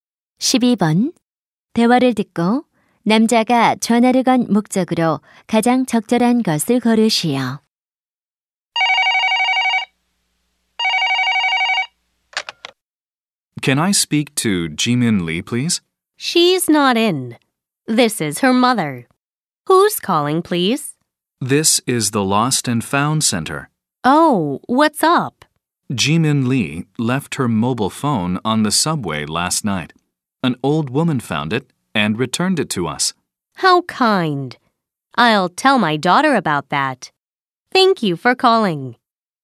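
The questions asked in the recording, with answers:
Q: 대화를 듣고 남자가 전화를 건 목적으로 가장 적절한 것을 고르시오.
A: 잃어버린 휴대전화를 찾았다고 알리려고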